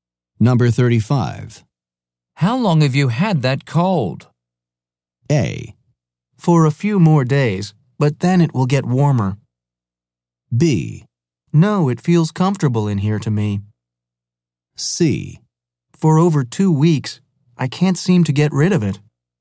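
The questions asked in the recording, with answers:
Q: How long have you had that cold?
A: C: For over 2 weeks, I can't seem to get rid of it.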